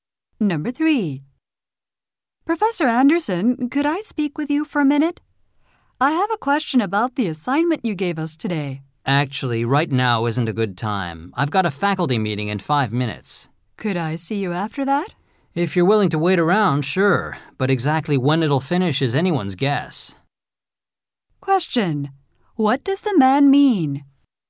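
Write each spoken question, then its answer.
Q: What does the man mean?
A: He can meet her after his faculty meeting, but he doesn't know when it will end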